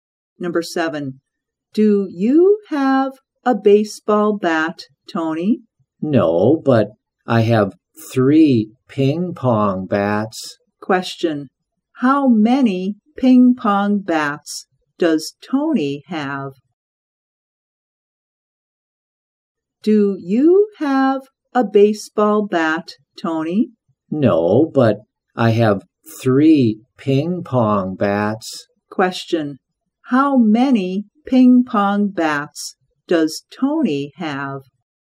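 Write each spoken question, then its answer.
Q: How many ping pong bats does Tony have?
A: Three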